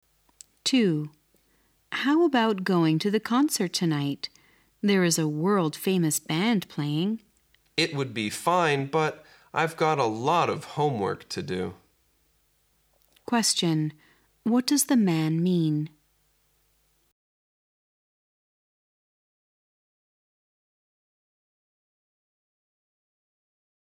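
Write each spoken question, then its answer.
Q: Question. What does the man mean?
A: He can't go because he has a lot of homework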